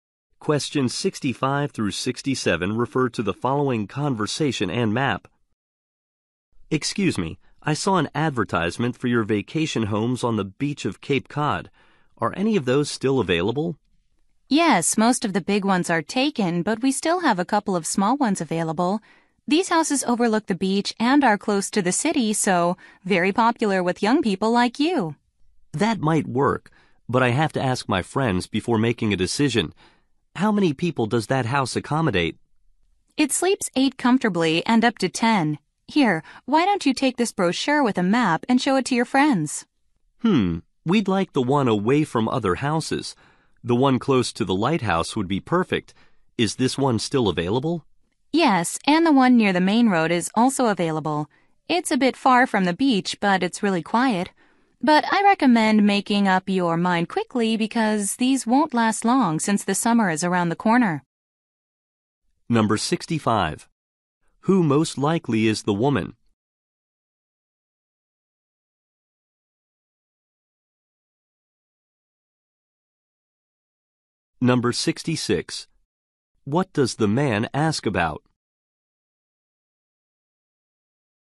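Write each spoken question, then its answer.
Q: Who most likely is the woman?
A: A vacation rental agent

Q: What does the man ask about?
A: How many people the house accommodates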